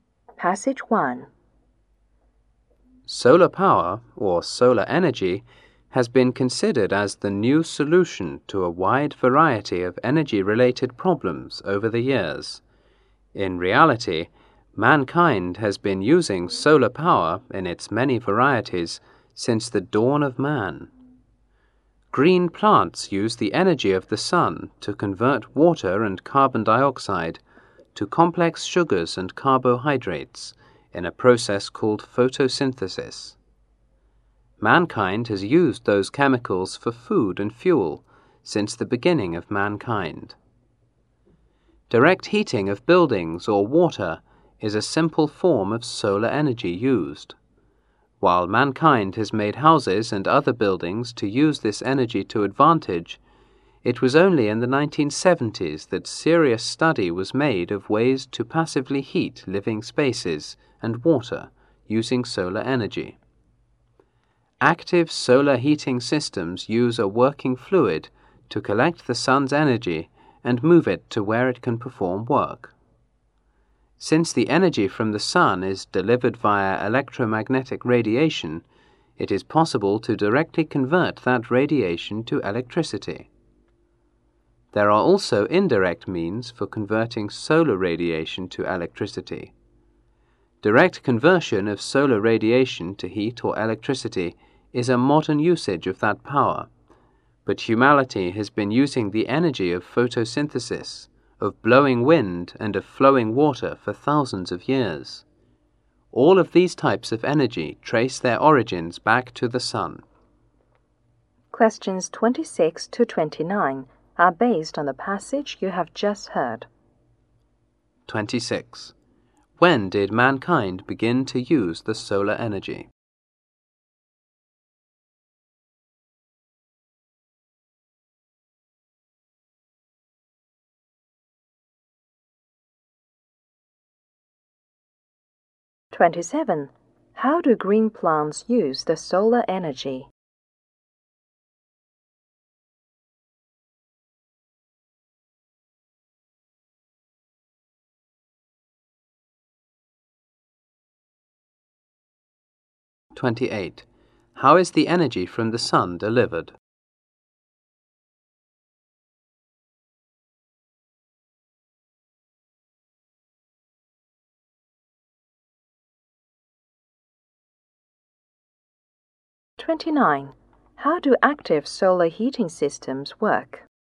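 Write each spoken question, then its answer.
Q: When did mankind begin to use the solar energy?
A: Since the dawn of man.

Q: How do green plants use the solar energy?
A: To convert water and carbon dioxide into sugars and carbohydrates (photosynthesis).

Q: How is the energy from the sun delivered?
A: By electromagnetic radiation.

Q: How do active solar heating systems work?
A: A working fluid collects the sun's energy and moves it to where it can do work.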